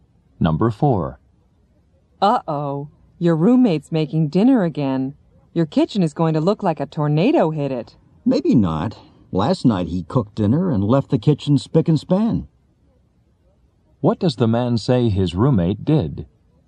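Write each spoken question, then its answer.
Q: What does the man say his roommate did?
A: He left the kitchen very clean after cooking last night.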